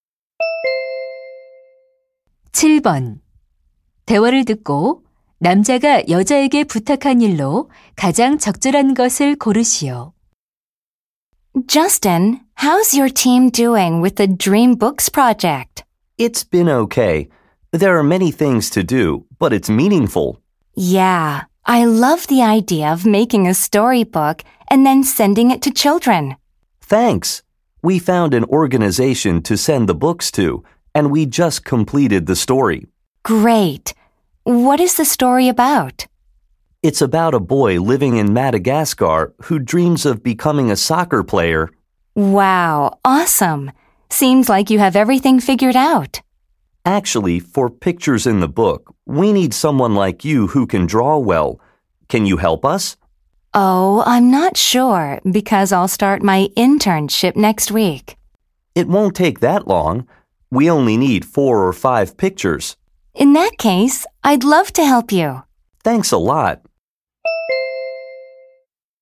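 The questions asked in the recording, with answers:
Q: 대화를 듣고 남자가 여자에게 부탁한 일로 가장 적절한 것을 고르시오.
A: 동화책 그림 그려 주기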